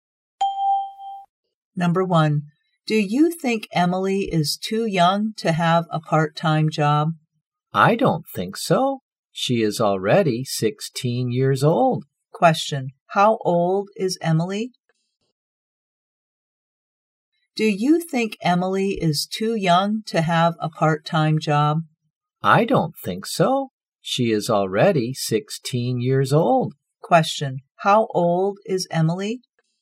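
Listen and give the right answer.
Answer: 16 years old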